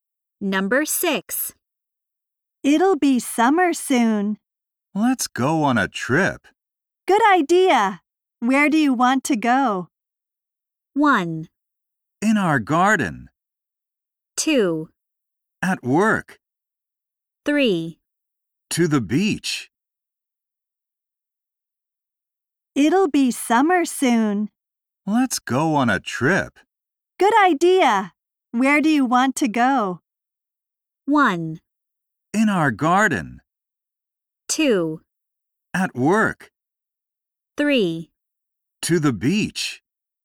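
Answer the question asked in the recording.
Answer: 3: To the beach.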